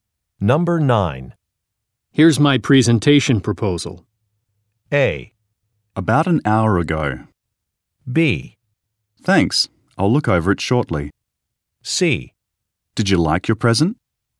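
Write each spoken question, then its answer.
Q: Here's my presentation proposal.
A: B: Thanks, I'll look over it shortly.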